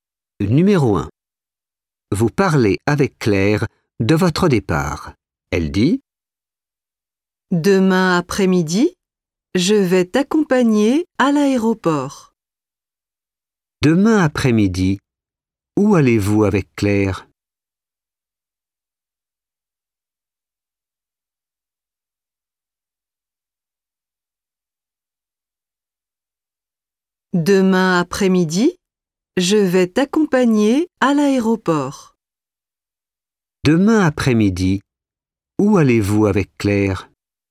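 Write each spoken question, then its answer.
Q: Demain après-midi, où allez-vous avec Claire?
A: À l'aéroport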